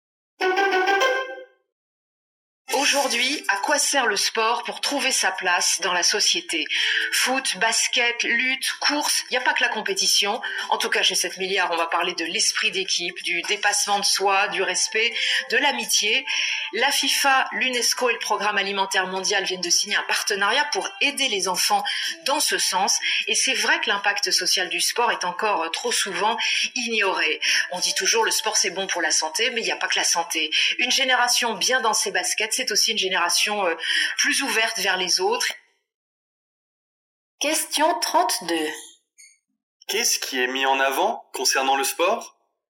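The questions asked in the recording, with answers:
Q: Qu'est-ce qui est mis en avant concernant le sport ?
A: Son impact social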